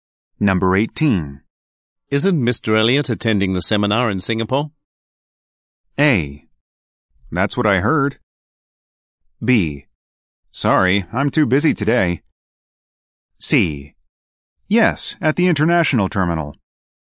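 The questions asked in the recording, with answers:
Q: Isn't Mr. Elliot attending the seminar in Singapore?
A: A: That's what I heard.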